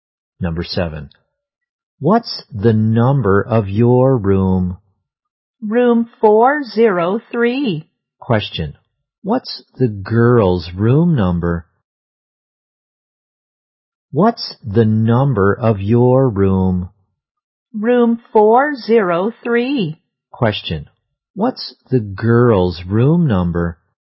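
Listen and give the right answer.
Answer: 403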